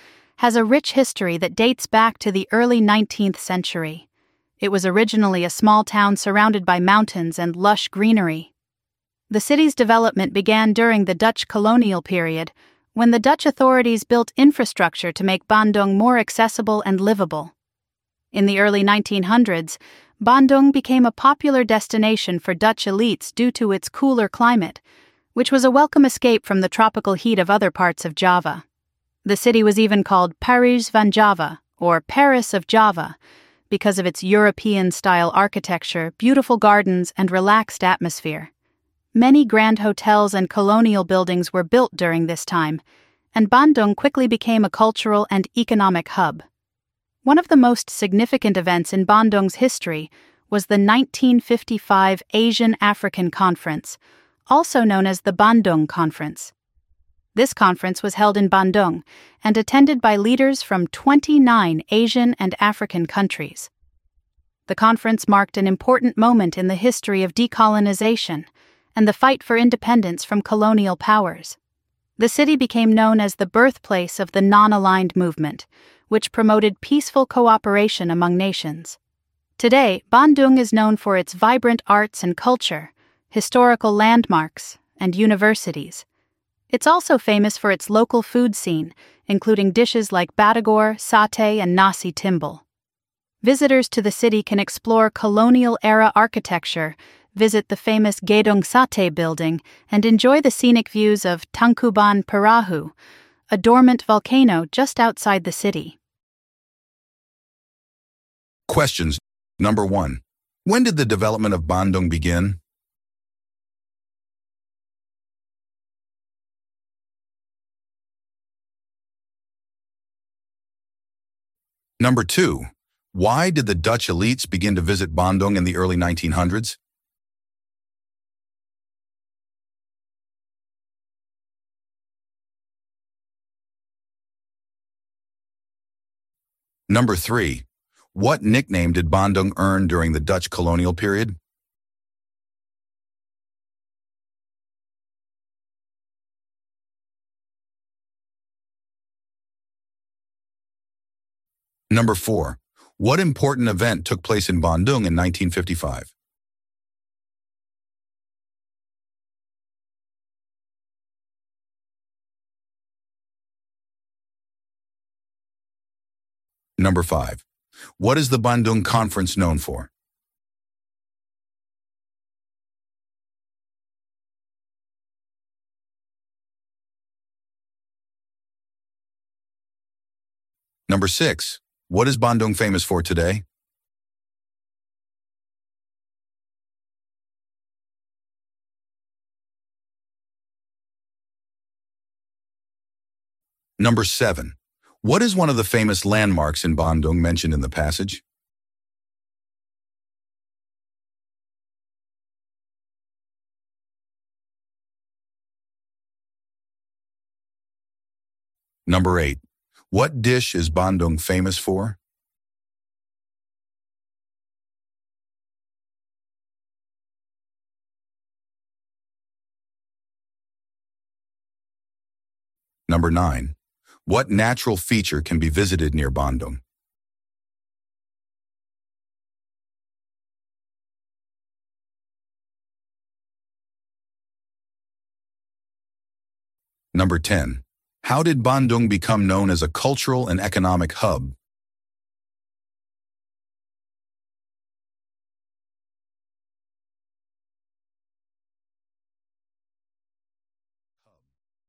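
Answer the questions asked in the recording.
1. During the Dutch colonial period
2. Because of its cooler climate
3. Paris van Java (Paris of Java)
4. The Asian-African Conference
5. Being the birthplace of the Non-Aligned Movement
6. Its vibrant arts and culture, historical landmarks, and universities
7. Gedung Sate
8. Batagor
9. Tangkuban Perahu, a dormant volcano
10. Many grand hotels and colonial buildings were built during the Dutch period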